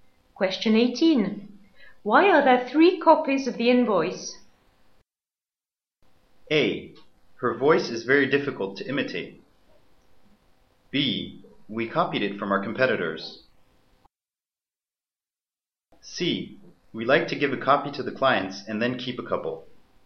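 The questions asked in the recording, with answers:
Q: Why are there three copies of the invoice?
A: C: We like to give a copy to the clients and then keep a couple.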